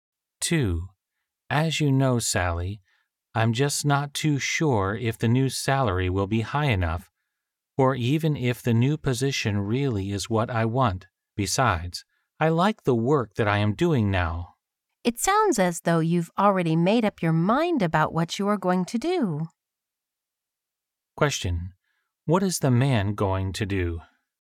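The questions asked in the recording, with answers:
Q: What is the man going to do?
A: Stay in his present job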